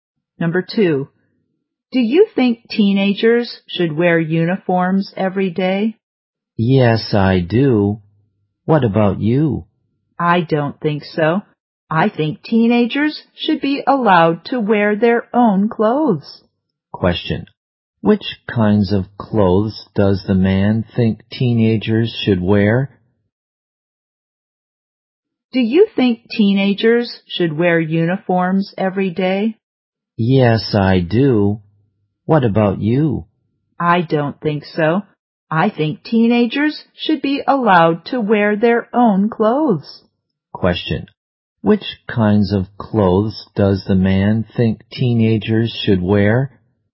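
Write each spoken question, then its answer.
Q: Which kinds of clothes does the man think teenagers should wear?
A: Their own clothes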